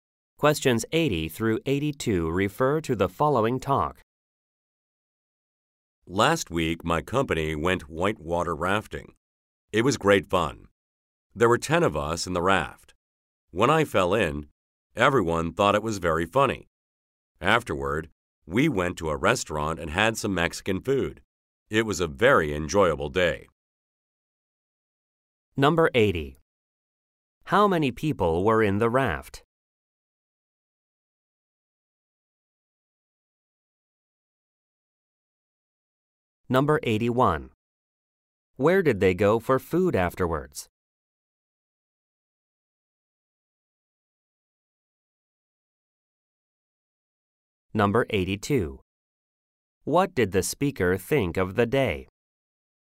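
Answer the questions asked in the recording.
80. 10
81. A Mexican restaurant
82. It was very enjoyable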